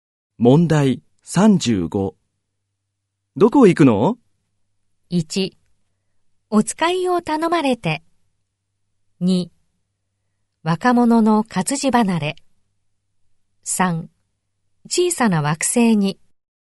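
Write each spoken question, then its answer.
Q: どこ行くの?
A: 1: お使いを頼まれて。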